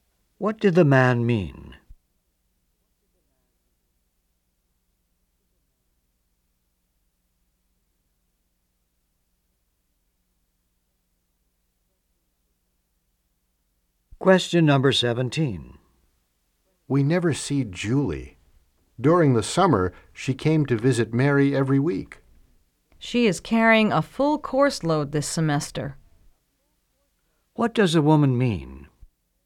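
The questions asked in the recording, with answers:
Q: What does a woman mean?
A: Julie is too busy with her classes this semester to visit.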